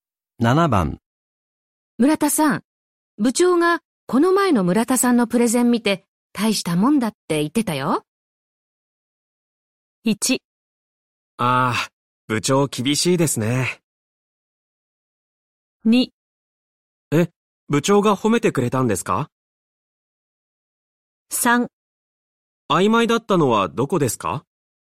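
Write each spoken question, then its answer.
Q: 村田さん、部長がこの前の村田さんのプレゼン見て大したもんだって言ってたよ。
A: 2: え、部長が褒めてくれたんですか?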